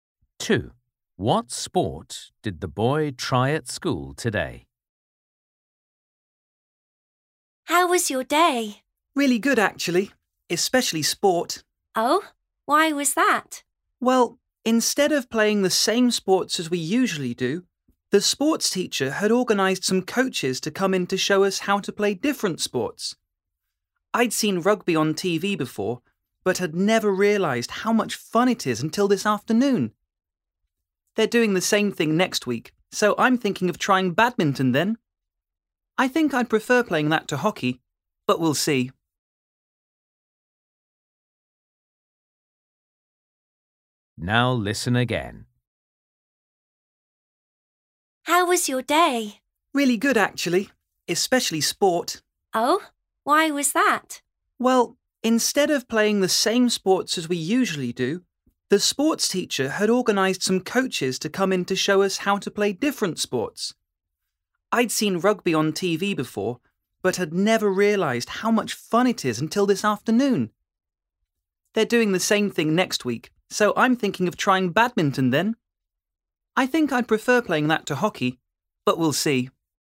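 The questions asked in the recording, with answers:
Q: What sport did the boy try at school today?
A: rugby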